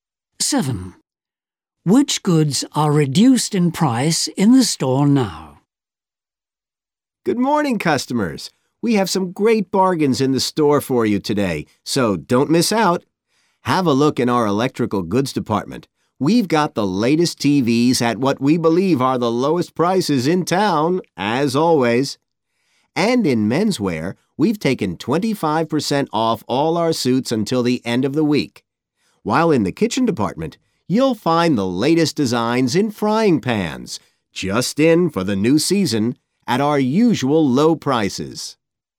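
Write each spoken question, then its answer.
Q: Which goods are reduced in price in the store now?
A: Men's suits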